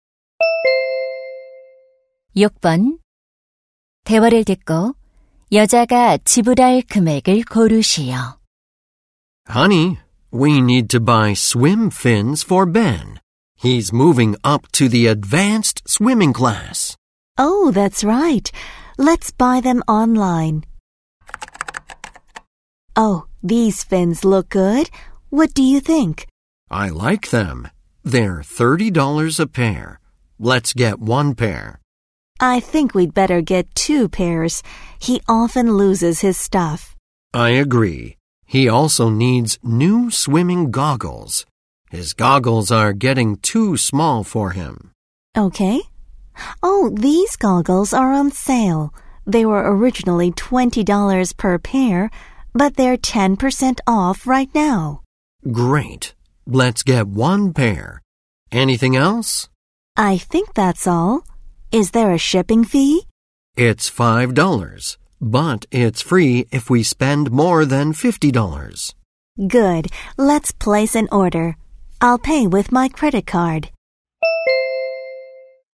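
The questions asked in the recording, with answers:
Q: 대화를 듣고 여자가 지불할 금액을 고르시오.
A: 78달러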